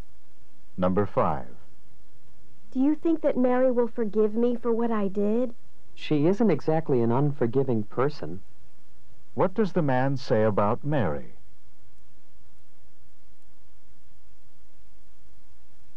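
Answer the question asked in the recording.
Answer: She is a forgiving person, so she will probably forgive.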